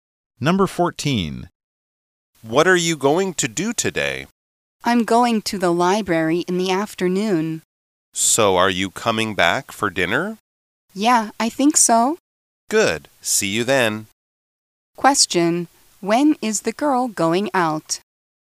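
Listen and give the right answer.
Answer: In the afternoon.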